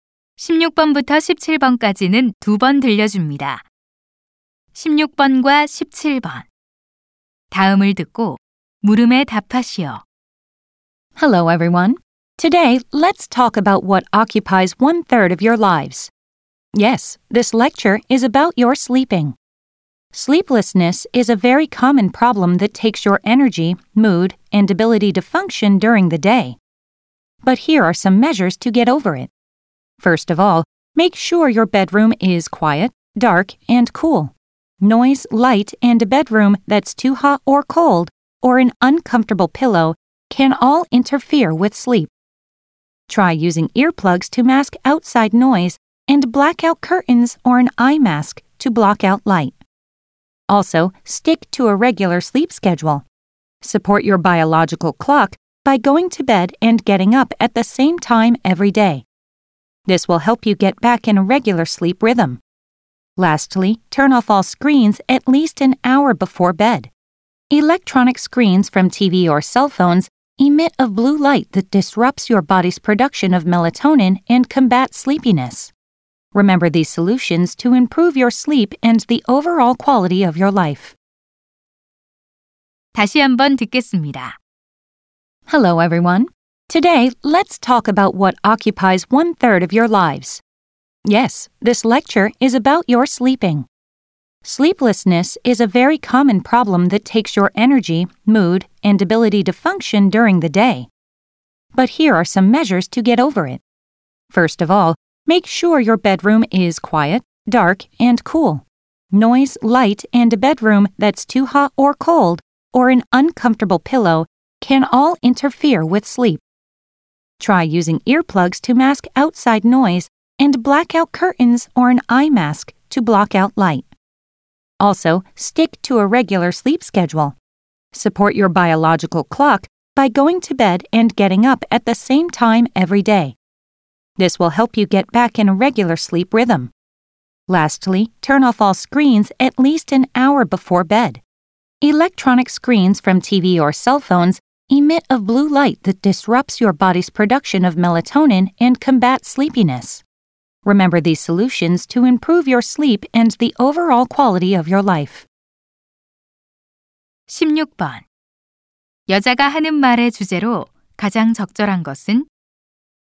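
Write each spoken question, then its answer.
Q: 여자가 하는 말의 주제로 가장 적절한 것은?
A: 잠을 잘 자기 위한 방법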